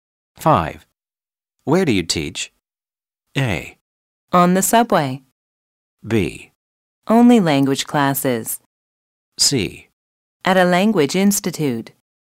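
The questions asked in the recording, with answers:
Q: Where do you teach?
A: C: At a language institute.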